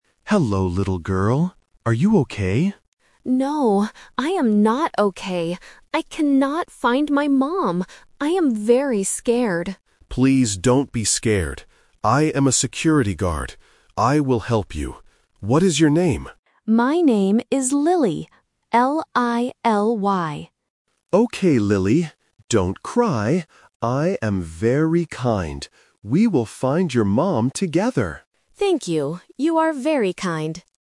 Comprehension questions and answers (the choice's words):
Listen to the conversation and circle the correct answer for each question.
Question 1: How does the little girl feel?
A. Happy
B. Angry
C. Scared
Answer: Scared

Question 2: What is the little girl's name?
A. Lucy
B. Lily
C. Milly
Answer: Lily

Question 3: How is the security guard?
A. Kind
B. Scared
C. Funny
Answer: Kind

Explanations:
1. The correct answer is (C). The little girl clearly says, "I am very scared," and the guard replies, "Please don't be scared." Options (A) "Happy" and (B) "Angry" are not mentioned in the audio.
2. The correct answer is (B). The girl spells her name clearly: "L-I-L-Y." Options (A) "Lucy" and (C) "Milly" are sound traps because they end with a similar "y" sound and have the "L" consonant.
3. The correct answer is (A). The guard says, "I am very kind," and the girl repeats, "You are very kind." Option (B) "Scared" is a trap; the girl is scared, not the guard. Option (C) "Funny" is never mentioned in the conversation.

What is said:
Security Guard: Hello, little girl. Are you okay?
Girl (Lily): No, I am not okay. I cannot find my mom. I am very scared.
Security Guard: Please don't be scared. I am a security guard. I will help you. What is your name?

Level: A1